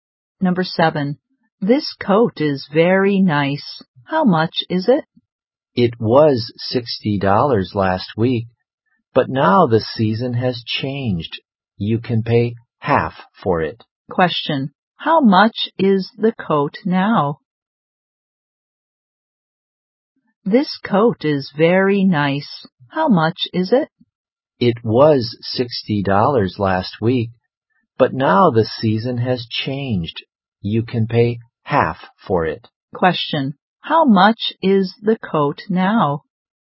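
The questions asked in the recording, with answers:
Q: How much is the coat now?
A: $30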